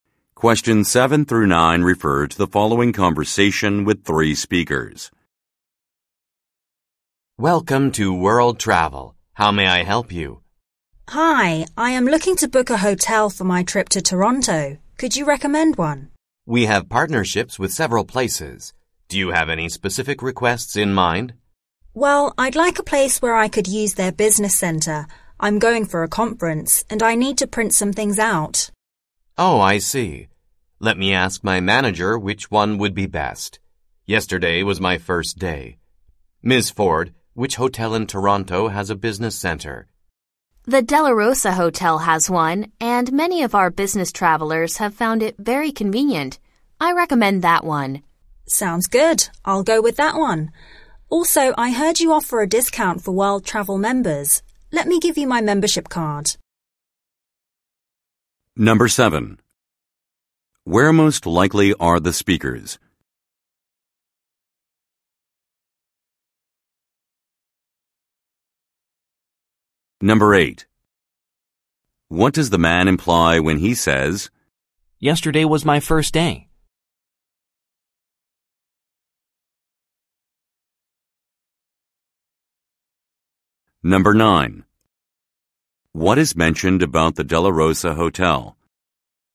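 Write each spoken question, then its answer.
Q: Where most likely are the speakers?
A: At a travel agency

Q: What does the man imply when he says,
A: He is new and doesn't know which hotel is best

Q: What is mentioned about the Della Rosa Hotel?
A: It has a business center that business travelers find convenient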